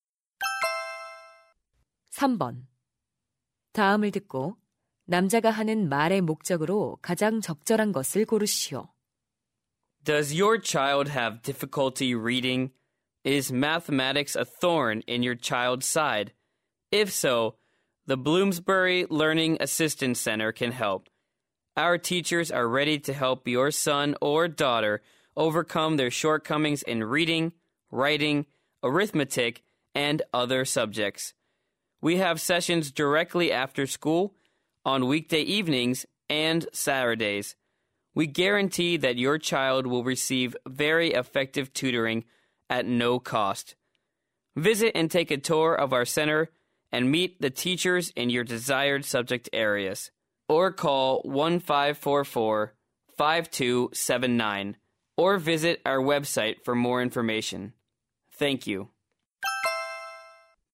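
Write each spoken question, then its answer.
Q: 다음을 듣고 남자가 하는 말의 목적으로 가장 적절한 것을 고르시오.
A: 무료 학습 지도 센터를 홍보하려고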